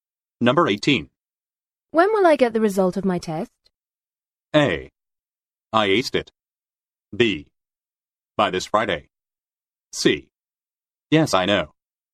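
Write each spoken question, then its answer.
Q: When will I get the result of my test?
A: B: By this Friday.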